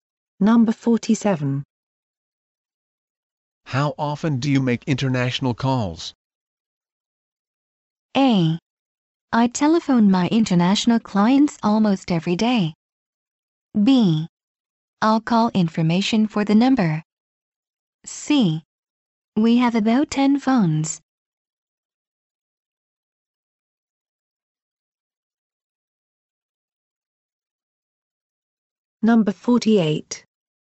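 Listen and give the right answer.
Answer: A: I telephone my international clients almost every day.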